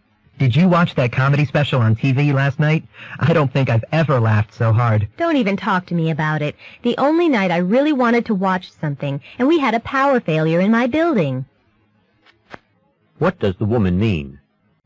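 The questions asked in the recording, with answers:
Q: What does the woman mean?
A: She missed the show because of a power failure.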